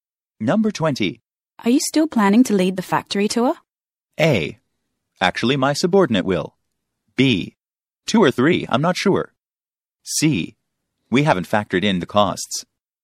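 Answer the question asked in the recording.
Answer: A: Actually, my subordinate will.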